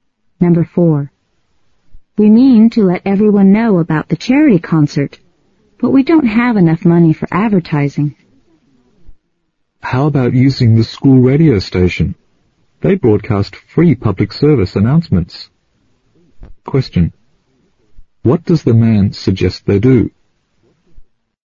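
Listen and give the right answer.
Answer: Use the school radio station to announce the concert for free.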